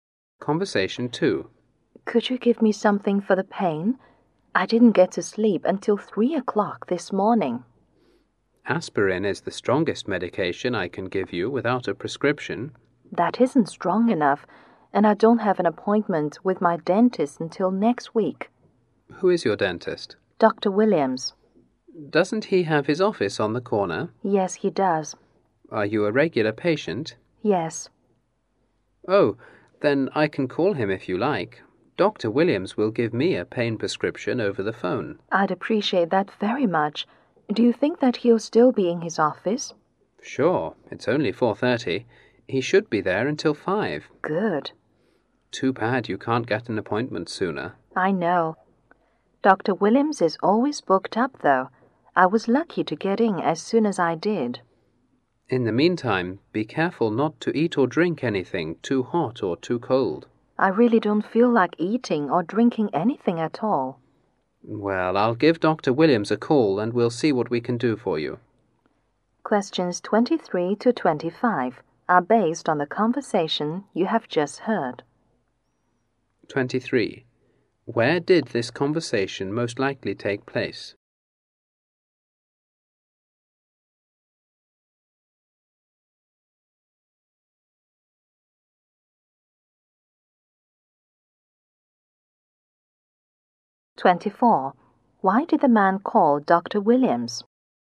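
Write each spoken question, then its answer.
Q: Where did this conversation most likely take place?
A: At a pharmacy.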